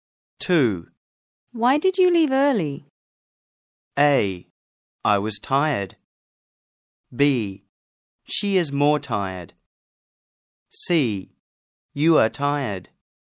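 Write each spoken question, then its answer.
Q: Why did you leave early?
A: A: I was tired.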